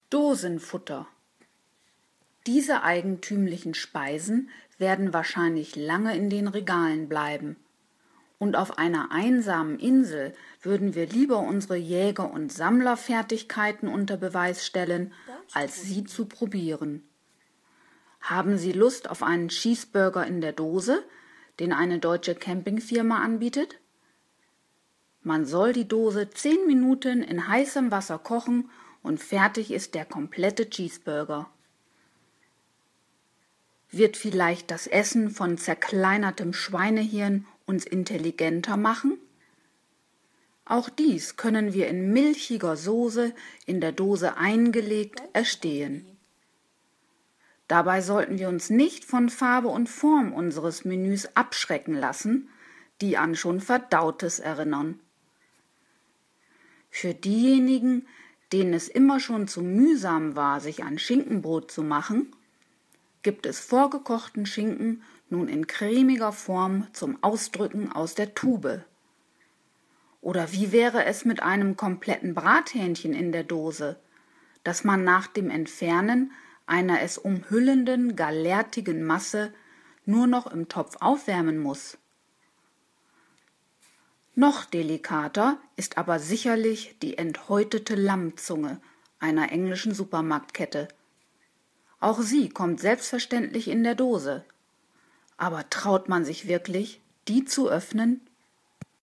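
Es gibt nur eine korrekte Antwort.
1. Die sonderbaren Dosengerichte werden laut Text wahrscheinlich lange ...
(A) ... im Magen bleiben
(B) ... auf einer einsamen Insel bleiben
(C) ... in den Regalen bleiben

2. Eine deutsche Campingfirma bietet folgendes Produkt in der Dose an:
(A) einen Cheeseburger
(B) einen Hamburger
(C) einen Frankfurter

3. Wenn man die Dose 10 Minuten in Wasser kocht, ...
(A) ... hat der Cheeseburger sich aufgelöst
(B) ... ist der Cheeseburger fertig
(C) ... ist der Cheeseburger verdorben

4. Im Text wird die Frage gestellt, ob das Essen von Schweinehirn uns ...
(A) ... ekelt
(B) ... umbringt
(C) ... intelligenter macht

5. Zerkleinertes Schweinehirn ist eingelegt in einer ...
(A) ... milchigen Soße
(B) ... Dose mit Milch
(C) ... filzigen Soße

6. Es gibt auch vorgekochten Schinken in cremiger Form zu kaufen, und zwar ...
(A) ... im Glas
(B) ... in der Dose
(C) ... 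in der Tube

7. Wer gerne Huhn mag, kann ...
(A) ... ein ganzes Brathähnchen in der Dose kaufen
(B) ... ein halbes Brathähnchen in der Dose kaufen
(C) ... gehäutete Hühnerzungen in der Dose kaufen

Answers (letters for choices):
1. C
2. A
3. B
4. C
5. A
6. C
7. A

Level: C1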